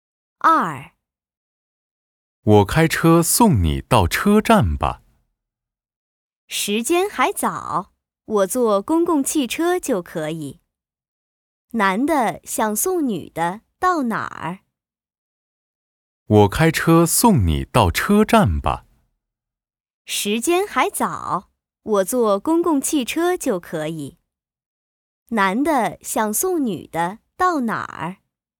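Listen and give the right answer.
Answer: 车站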